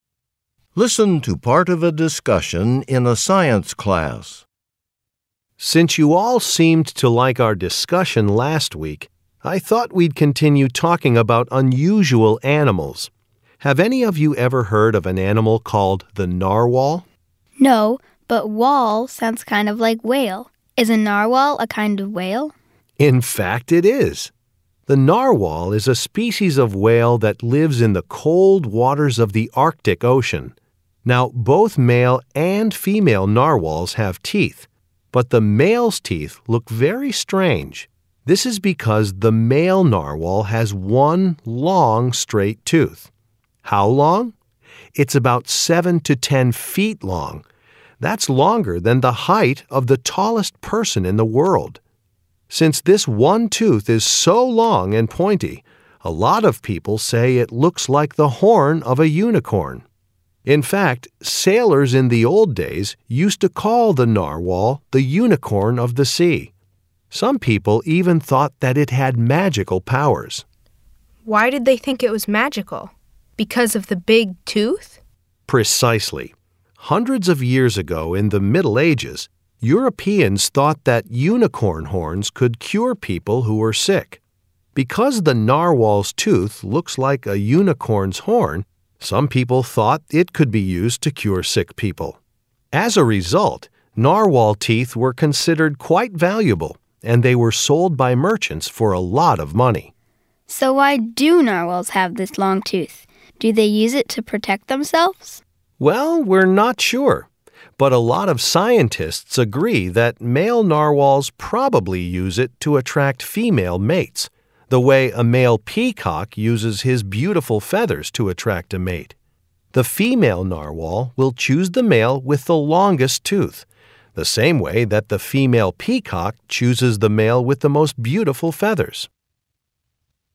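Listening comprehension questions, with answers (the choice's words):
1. Why does the teacher mention unicorns?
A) To explain why people thought narwhals were also mythical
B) To discuss why it is so difficult to find narwhals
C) To tell the class what they will learn about next week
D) To describe what a narwhal's tooth looks like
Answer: To describe what a narwhal's tooth looks like

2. Why did people in Europe hundreds of years ago think the narwhal was special?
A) They thought they could use its tooth to make medicine.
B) They thought it brought good luck.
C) They thought it was a type of mermaid.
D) They thought it was a highly intelligent animal.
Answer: They thought they could use its tooth to make medicine.

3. Why does the teacher mention peacocks?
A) To demonstrate how valuable narwhals are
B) To describe the different colors of male narwhals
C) To help explain the purpose of the male narwhal's tooth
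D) To talk about a popular animal in medieval Europe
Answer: To help explain the purpose of the male narwhal's tooth

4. What is the main topic of the talk?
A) The eating habits of large sea animals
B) An animal with an unusual physical feature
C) An animal with a very long life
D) Mythical creatures of Europe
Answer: An animal with an unusual physical feature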